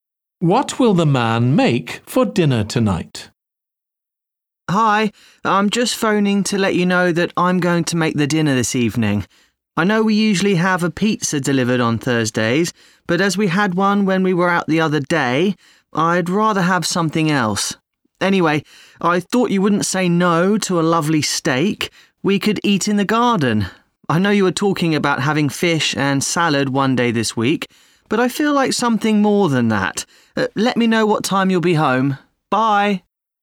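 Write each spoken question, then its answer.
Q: What will the man make for dinner tonight?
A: steak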